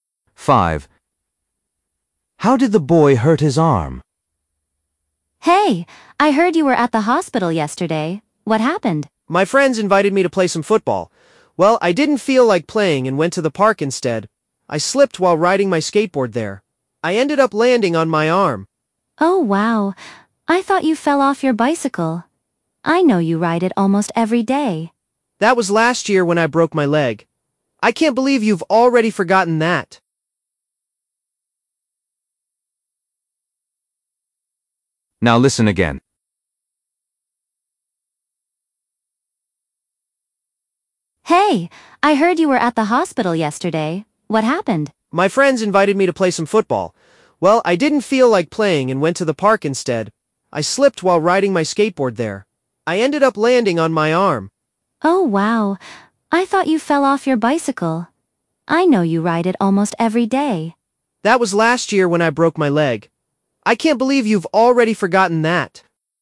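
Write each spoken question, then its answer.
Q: How did the boy hurt his arm?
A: he slipped while riding his skateboard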